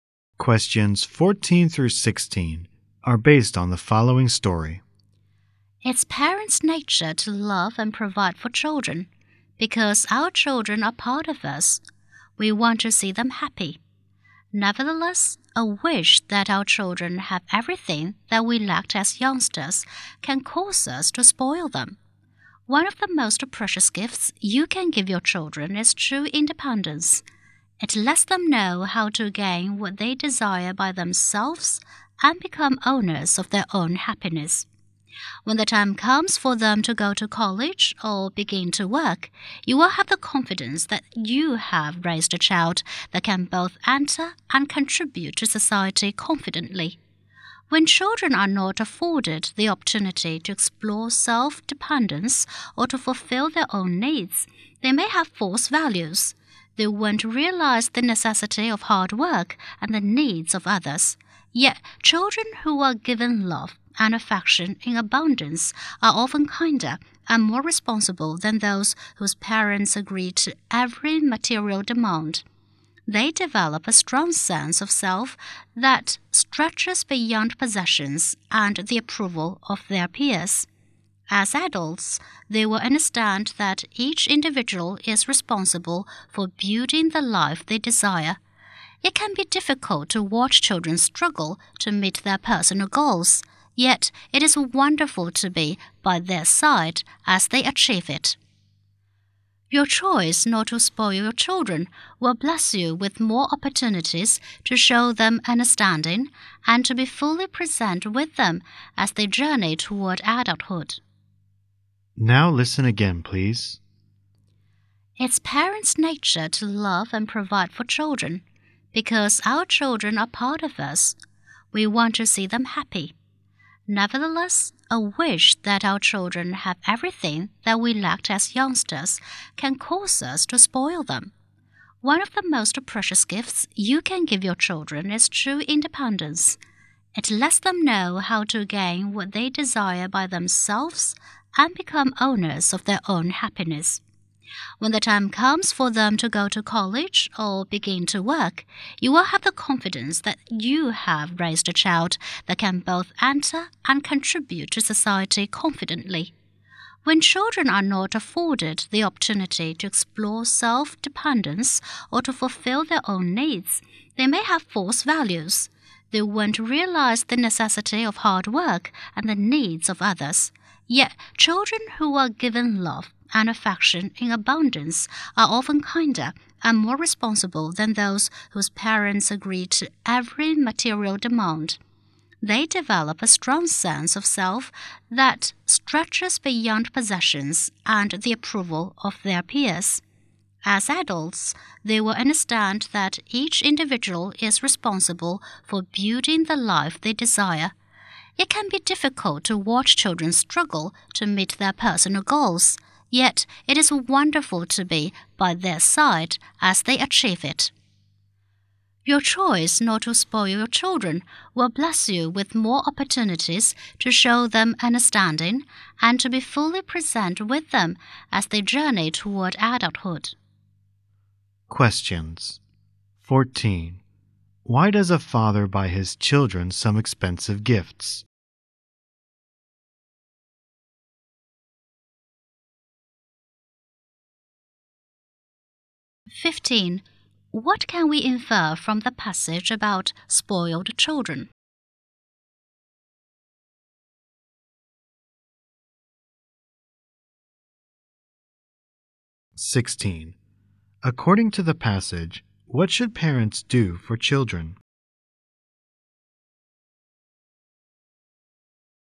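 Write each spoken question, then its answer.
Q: According to the passage, what should parents do for children?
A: Give them true independence.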